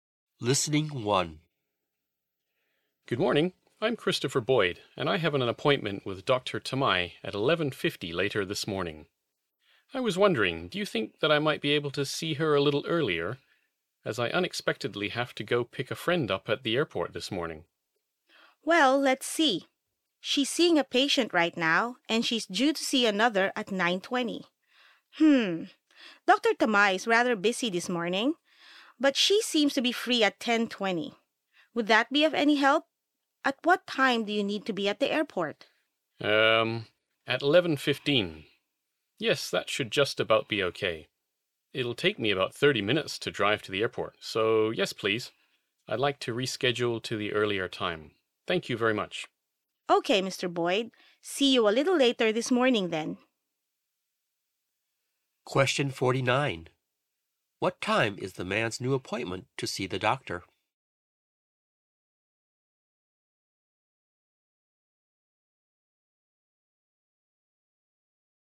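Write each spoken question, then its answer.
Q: What time is the man's new appointment to see the doctor?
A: 10:20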